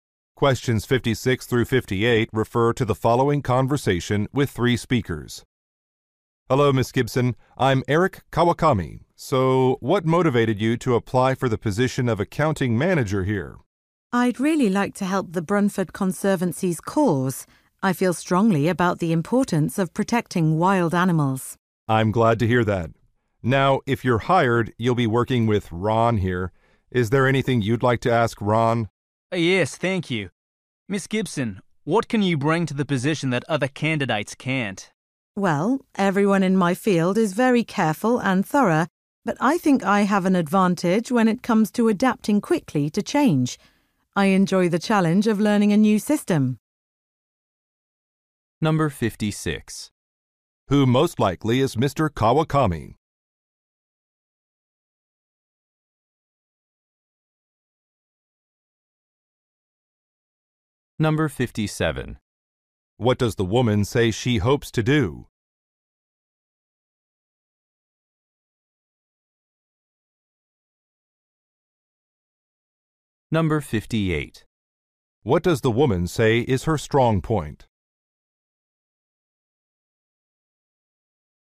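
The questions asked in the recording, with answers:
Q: What does the woman say she hopes to do?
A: Help protect wild animals

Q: What does the woman say is her strong point?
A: Adapting quickly to change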